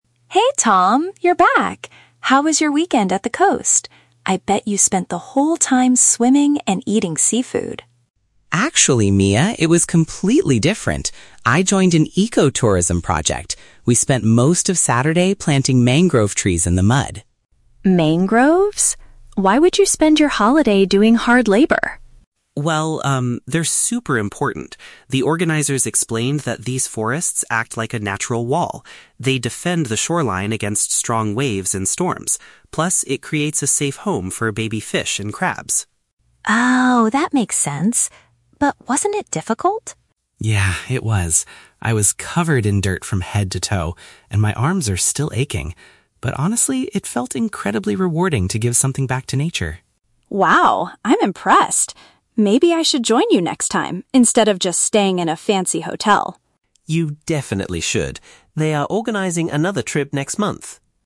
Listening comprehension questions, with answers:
Listen to a conversation between a sister and her brother about a recent weekend trip. Choose the correct answer (A, B, or C) for each question.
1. What did Tom primarily do during his weekend trip?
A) He relaxed on the beach and swam.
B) He helped restore a coastal forest.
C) He learned how to catch local seafood.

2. According to Tom, what is one main benefit of the mangrove trees?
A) They provide wood for building local boats.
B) They attract more tourists to the luxury resorts.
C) They protect the land from extreme weather.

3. How does Tom describe his overall experience?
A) He felt physically tired but deeply satisfied.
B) He was disappointed because the area was too dirty.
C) He regretted not staying in a comfortable room.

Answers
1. B) He helped restore a coastal forest.
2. C) They protect the land from extreme weather.
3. A) He felt physically tired but deeply satisfied.

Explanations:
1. Tom says he spent Saturday "planting mangrove trees". "Planting trees" is paraphrased as "restore a coastal forest". Why traps are wrong: Option A is a trap because Mia guessed he went "swimming", but Tom says his trip was completely different. Option C is incorrect because Mia mentions "eating seafood", but Tom never talks about catching or cooking it.
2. Tom explains that the trees act like a natural wall to "defend the shoreline against strong waves and storms" (paraphrased as "protect the land from extreme weather"). Why traps are wrong: Option A is plausible but never mentioned in the audio. Option B is a trap; Mia mentions staying in a "fancy hotel" at the end, but this is not a benefit of the trees.
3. Tom admits his "arms are still aching" (physically tired) but says it felt "incredibly rewarding" (deeply satisfied). Why traps are wrong: Option B is a trap because he mentions being "covered in dirt," but he was not disappointed by it. Option C is incorrect because he does not express any regret; instead, he encourages Mia to join him next time rather than staying in a hotel.

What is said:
Mia: Hey Tom, you're back! How was your weekend at the coast? I bet you spent the whole time swimming and eating seafood.
Tom: Actually, Mia, it was completely different. I joined an ecotourism project. We spent most of Saturday planting mangrove trees in the mud.
Mia: Mangroves? Why would you spend your holiday doing hard labor?
Tom: Well, um, they're super important. The organizers explained that these forests act like a natural wall. They defend the shoreline against strong waves and storms. Plus, it creates a safe home for baby fish and crabs.
Mia: Oh, that makes sense. But wasn't it difficult?
Tom: Yeah, it was. I was covered in dirt from head to toe, and my arms are still aching. But honestly, it felt incredibly rewarding to give something back to nature.
Mia: Wow, I'm impressed. Maybe I should join you next time instead of just staying in a fancy hotel.

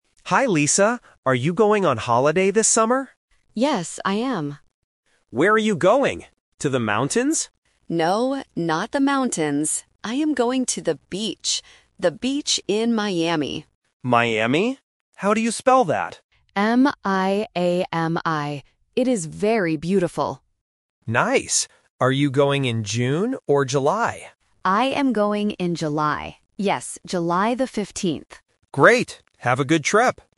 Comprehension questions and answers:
Listen to the conversation and choose the correct answer (A, B, or C).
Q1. Where is the woman going for her summer holiday?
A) To the mountains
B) To the beach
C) To the city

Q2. How do you spell the name of the place?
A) M-I-A-M-I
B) M-A-I-M-I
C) M-I-A-M-Y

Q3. When is she going on holiday?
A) In June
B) In July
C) In August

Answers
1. B) To the beach
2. A) M-I-A-M-I
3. B) In July

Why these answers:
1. The woman clearly states, "I am going to the beach." Option (A) is the trap because the man asks if she is going to the mountains, but she says "No." Option (C) is never mentioned.
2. The woman spells the word letter by letter: M-I-A-M-I. Options (B) and (C) are traps using similar-sounding letters to test basic alphabet listening skills.
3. The woman says, "I am going in July." She also repeats it to confirm: "Yes, July the 15th." Option (A) is the trap because the man asks "June or July," but June is not the final choice. Option (C) is not mentioned.

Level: A1

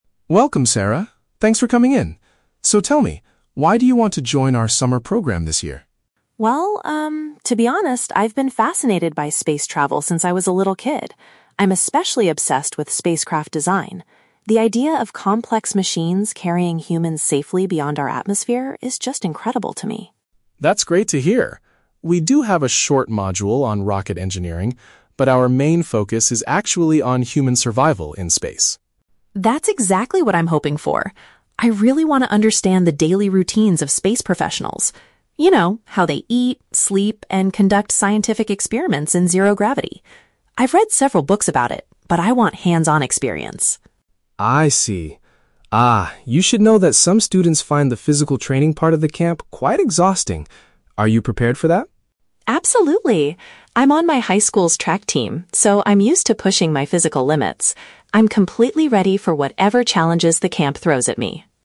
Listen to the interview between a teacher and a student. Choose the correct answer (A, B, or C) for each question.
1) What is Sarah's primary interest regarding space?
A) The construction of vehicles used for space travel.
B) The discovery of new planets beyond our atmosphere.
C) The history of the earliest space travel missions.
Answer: A) The construction of vehicles used for space travel.

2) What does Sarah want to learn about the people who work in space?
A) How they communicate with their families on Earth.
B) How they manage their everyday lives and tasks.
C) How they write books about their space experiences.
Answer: B) How they manage their everyday lives and tasks.

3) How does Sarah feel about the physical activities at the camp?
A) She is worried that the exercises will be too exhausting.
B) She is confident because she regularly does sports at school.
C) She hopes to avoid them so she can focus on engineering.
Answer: B) She is confident because she regularly does sports at school.

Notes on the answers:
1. Sarah says she is "obsessed with spacecraft design" and the idea of "machines carrying humans." This paraphrases to the construction of vehicles. Option (B) is Plausible but not mentioned. Option (C) is The Trap: She mentions being interested in space travel "since I was a little kid," but she never talks about the history of early missions.
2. Sarah wants to understand the "daily routines" of astronauts, such as "how they eat, sleep, and conduct scientific experiments." Option (A) is not mentioned. Option (C) is The Trap: She mentions reading books ("I've read several books about it"), but she doesn't want to learn how astronauts write books.
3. Sarah says "Absolutely," meaning she is prepared, because she is on her "high school's track team" (regularly does sports). Option (A) is The Trap: Mr. Davis is the one who mentions that the training can be "exhausting," but Sarah is not worried about it at all. Option (C) is incorrect because she does not want to avoid the physical training.

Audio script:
Davis: Welcome, Sarah. Thanks for coming in. So, tell me, why do you want to join our summer program this year?
Sarah: Well, um, to be honest, I've been fascinated by space travel since I was a little kid. I'm especially obsessed with spacecraft design. The idea of complex machines carrying humans safely beyond our atmosphere is just incredible to me.
Davis: That's great to hear. We do have a short module on rocket engineering. But our main focus is actually on human survival in space.
Sarah: That's exactly what I'm hoping for! I really want to understand the daily routines of space professionals. You know, how they eat, sleep, and conduct scientific experiments in zero gravity. I've read several books about it, but I want hands-on experience.
Davis: I see. Ah, you should know that some students find the physical training part of the camp quite exhausting. Are you prepared for that?
Sarah: Absolutely. I'm on my high school's track team, so I'm used to pushing my physical limits. I'm completely ready for whatever challenges the camp throws at me.

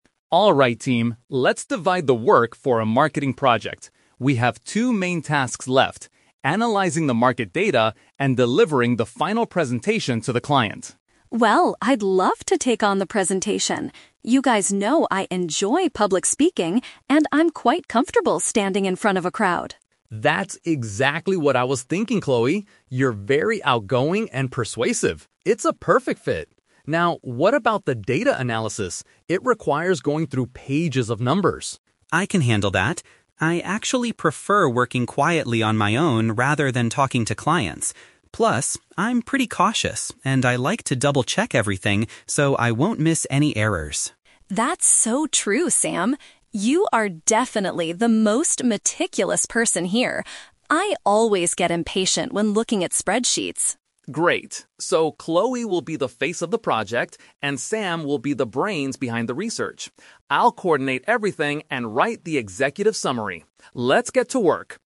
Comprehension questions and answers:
Listen to a conversation between a team leader and his project members. For each question, choose the correct answer A, B, or (C).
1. Why is Chloe given the presentation task?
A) She is the team leader of the marketing project.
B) She is confident when speaking to large groups.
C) She previously worked as a professional presenter.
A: B) She is confident when speaking to large groups.

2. What personality trait makes Sam suitable for the data analysis?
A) He pays close attention to small details.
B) He is very persuasive and energetic.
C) He gets easily bored when looking at spreadsheets.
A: A) He pays close attention to small details.

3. What will Mark do for the team?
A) He will help Sam find mistakes in the numbers.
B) He will talk to the clients together with Chloe.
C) He will manage the project and write a report.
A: C) He will manage the project and write a report.

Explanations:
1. Chloe says she enjoys "public speaking" and is "comfortable standing in front of a crowd." Mark also calls her "outgoing." Option B perfectly paraphrases these traits. Trap Alert: Option A is a trap because Mark is the one acting as the team leader (coordinating the work), not Chloe. Option C is plausible but never mentioned in the audio.
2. Sam says he is "cautious" and likes to "double-check everything" so he doesn't miss errors. Chloe also calls him "meticulous." Option A is a B1-level synonym phrase for being meticulous and careful. Trap Alert: Option B is a trap because "persuasive" is the word Mark used to describe Chloe. Option C is also a trap because it was Chloe who said she gets "impatient" with spreadsheets, not Sam.
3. At the end, Mark says, "I'll coordinate everything and write the executive summary." To "coordinate" means to manage, and an "executive summary" is a type of report. Trap Alert: Option A is a trap because Sam specifically said he prefers "working quietly on my own" to find the errors. Option B is a trap because Chloe will be the only "face of the project" (doing the presentation alone).

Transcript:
Mark: Alright team, let's divide the work for our marketing project. We have two main tasks left: analyzing the market data and delivering the final presentation to the client.
Chloe: Well, I'd love to take on the presentation! You guys know I enjoy public speaking and I'm quite comfortable standing in front of a crowd.
Mark: That's exactly what I was thinking, Chloe. You're very outgoing and persuasive. It's a perfect fit. Now, what about the data analysis? It requires going through pages of numbers.
Sam: I can handle that. I actually prefer working quietly on my own rather than talking to clients. Plus, I'm pretty cautious and I like to double-check everything, so I won't miss any errors.
Chloe: That's so true, Sam. You are definitely the most meticulous person here. I always get impatient when looking at spreadsheets.
Mark: Great. So, Chloe will be the face of the project, and Sam will be the brains behind the research. I'll coordinate everything and write the executive summary. Let's get to work!

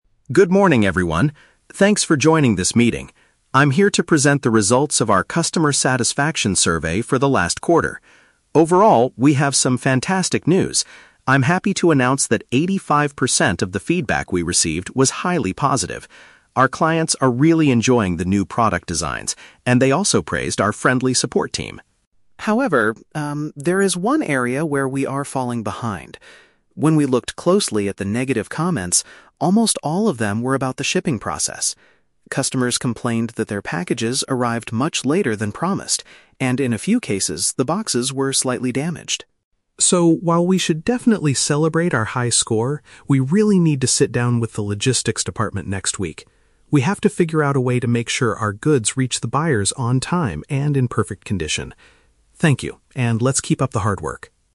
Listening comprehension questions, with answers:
Listen to a manager giving a presentation about a customer survey. Choose the correct answer (A, B, or C).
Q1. What did the majority of the customers think about the company?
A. They thought the prices were too expensive.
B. They gave the company an eighty-five percent discount.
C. They were very pleased with the products and staff.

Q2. What was the main problem mentioned in the negative reviews?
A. The items were not delivered on time.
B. The customer support team was unfriendly.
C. The company website was difficult to use.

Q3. What does the manager plan to do next week?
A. Celebrate the high score with a big company party.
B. Have a meeting with the delivery team.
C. Send an apology letter to all the unhappy buyers.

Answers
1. C. They were very pleased with the products and staff.
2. A. The items were not delivered on time.
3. B. Have a meeting with the delivery team.

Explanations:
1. The manager says that 85% of the feedback was "highly positive" because clients are "enjoying the new product designs" and praised the "friendly support team" (staff).
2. The manager states that the negative comments were about the "shipping process" and that packages "arrived much later than promised". This is a B1 paraphrase for items not being delivered on time.
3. The manager says, "we really need to sit down with the logistics department next week." To "sit down with" someone means to have a meeting with them, and the "logistics department" is the delivery team.

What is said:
Alex: Good morning, everyone. Thanks for joining this meeting. I'm here to present the results of our customer satisfaction survey for the last quarter. Overall, we have some fantastic news. I'm happy to announce that eighty-five percent of the feedback we received was highly positive. Our clients are really enjoying the new product designs, and they also praised our friendly support team.
However, um, there is one area where we are falling behind. When we looked closely at the negative comments, almost all of them were about the shipping process. Customers complained that their packages arrived much later than promised, and in a few cases, the boxes were slightly damaged.
So, while we should definitely celebrate our high score, we really need to sit down with the logistics department next week. We have to figure out a way to make sure our goods reach the buyers on time and in perfect condition. Thank you, and let's keep up the hard work.

